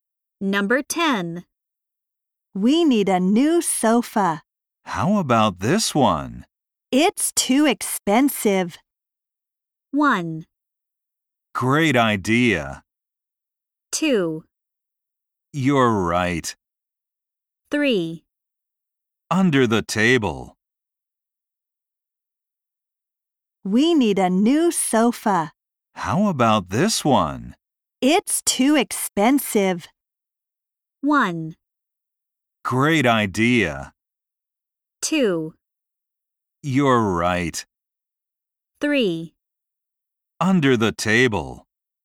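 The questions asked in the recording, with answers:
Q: It's too expensive.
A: 2: You're right.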